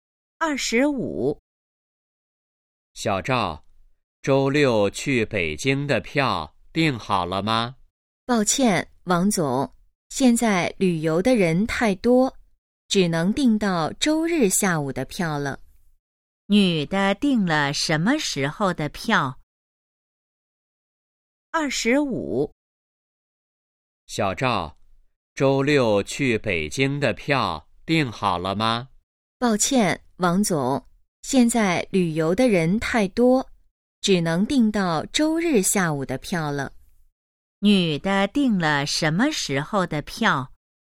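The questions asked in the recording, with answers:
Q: 女的订了什么时候的票?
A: 周日下午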